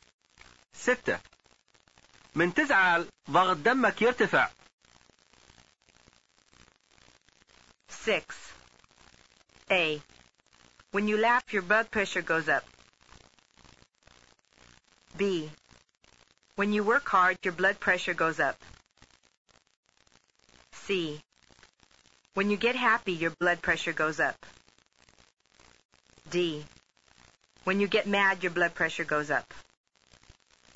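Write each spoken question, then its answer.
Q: من تزعل ضغط دمك يرتفع.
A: D: When you get mad, your blood pressure goes up.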